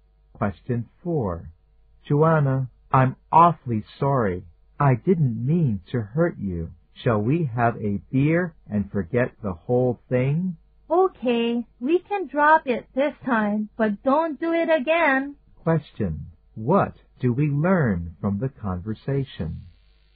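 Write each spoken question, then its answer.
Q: What do we learn from the conversation?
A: The man apologized for hurting Joanna, and she forgave him this time.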